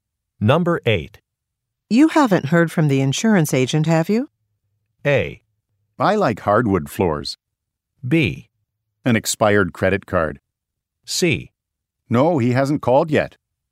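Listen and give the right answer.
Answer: C: No, he hasn't called yet.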